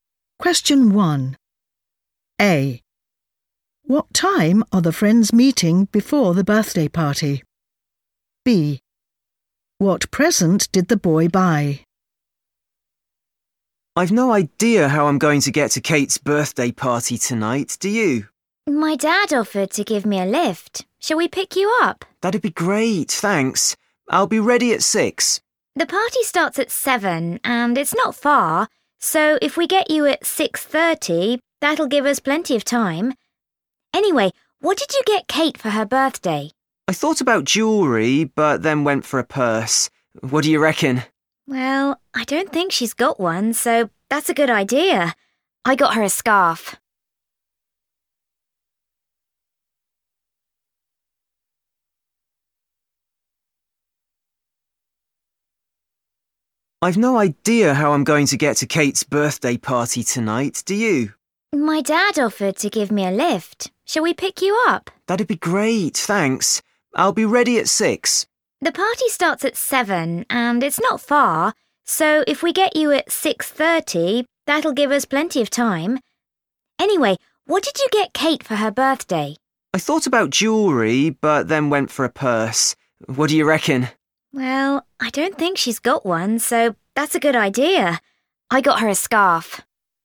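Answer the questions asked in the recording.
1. 6:30
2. a scarf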